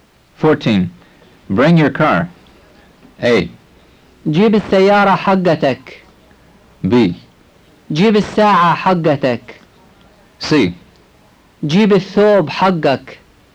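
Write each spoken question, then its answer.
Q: Bring your car.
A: A: جيب السيارة حقتك.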